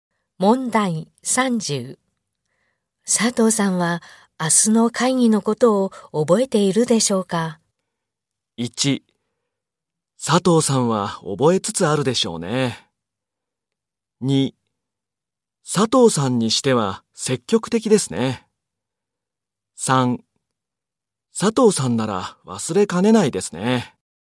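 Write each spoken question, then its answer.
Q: 佐藤さんは明日の会議のことを覚えているでしょうか?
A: 3: 佐藤さんなら忘れかねないですね。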